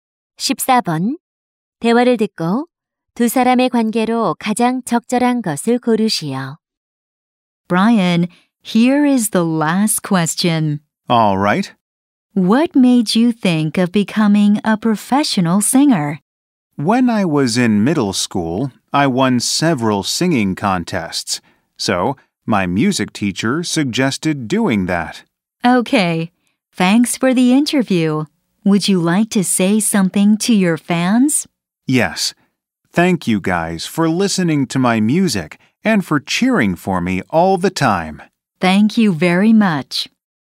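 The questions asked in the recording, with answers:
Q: 대화를 듣고 두 사람의 관계로 가장 적절한 것을 고르시오.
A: 인터뷰 진행자와 가수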